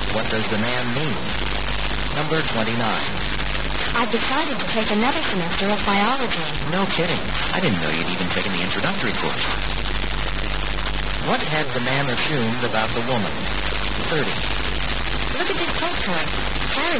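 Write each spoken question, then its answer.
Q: What had the man assumed about the woman?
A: She had not taken biology before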